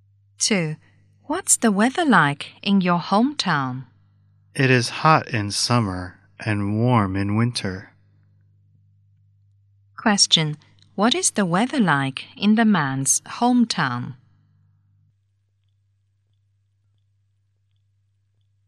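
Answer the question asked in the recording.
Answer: Hot in summer and warm in winter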